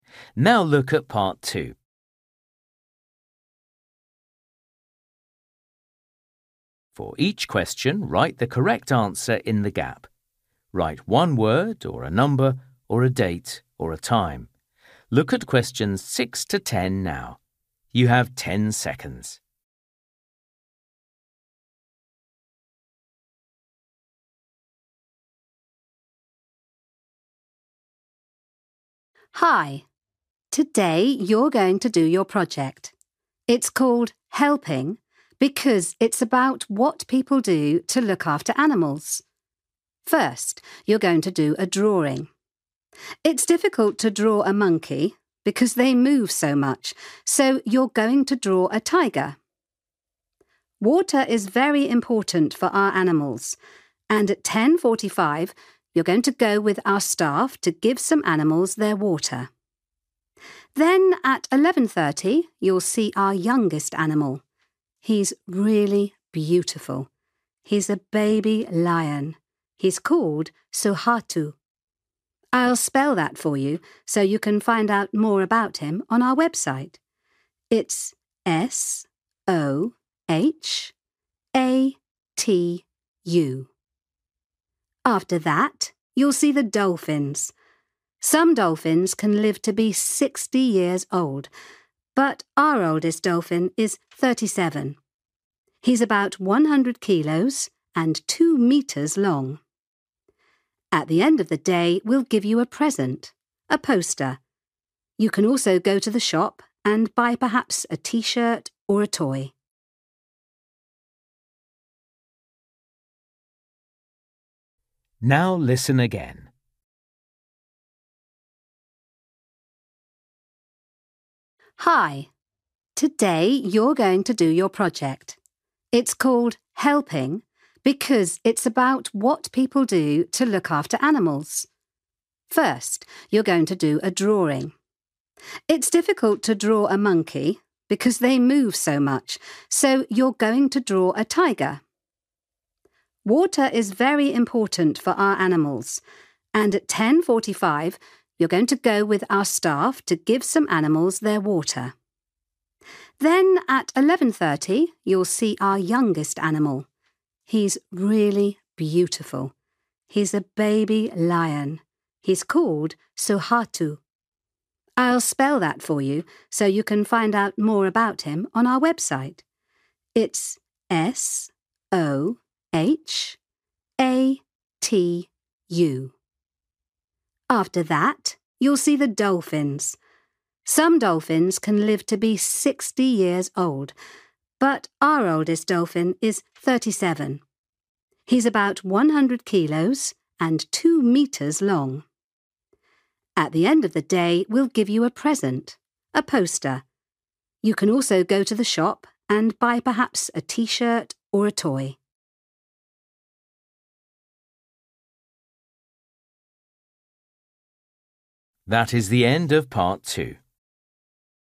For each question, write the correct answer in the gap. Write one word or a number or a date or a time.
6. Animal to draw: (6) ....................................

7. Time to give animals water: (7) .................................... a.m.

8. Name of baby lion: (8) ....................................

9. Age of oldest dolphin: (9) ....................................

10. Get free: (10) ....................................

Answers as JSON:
{"6": "tiger", "7": "10:45", "8": "Sohatu", "9": "37 / thirty-seven", "10": "poster"}

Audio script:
Woman: Hi. Today you're going to do your project. It's called Helping because it's about what people do to look after animals.
First, you're going to do a drawing. It's difficult to draw a monkey because they move so much, so you're going to draw a tiger.
Water is very important for our animals, and at ten forty-five you're going to go with our staff to give some animals their water. Then, at eleven thirty, you'll see our youngest animal. He's really beautiful; he's a baby lion. He's called Sohatu. I'll spell that for you, so you can find out more about him on our website. It's S-O-H-A-T-U.
After that, you'll see the dolphins. Some dolphins can live to be sixty years old, but our oldest dolphin is thirty-seven. He's about one hundred kilos and two metres long.
At the end of the day, we'll give you a present -a poster. You can also go to the shop and buy perhaps a T-shirt or a toy.

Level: A2